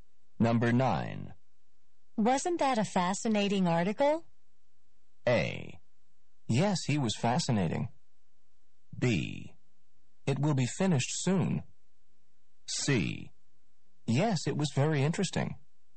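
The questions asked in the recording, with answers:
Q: Wasn't that a fascinating article?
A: C: Yes, it was very interesting.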